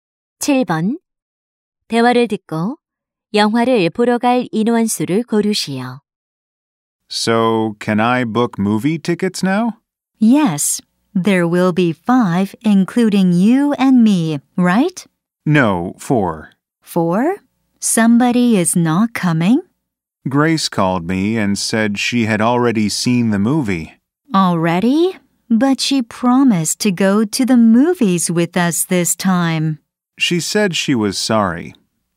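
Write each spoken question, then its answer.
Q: 대화를 듣고 영화를 보러 갈 인원 수를 고르시오.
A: 4명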